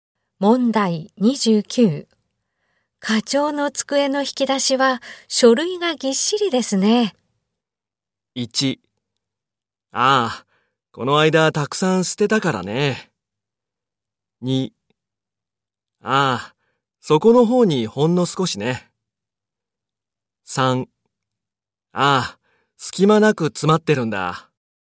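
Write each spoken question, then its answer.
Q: 課長の机の引き出しは書類がぎっしりですね。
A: 3: ああ、隙間なく詰まってるんだ。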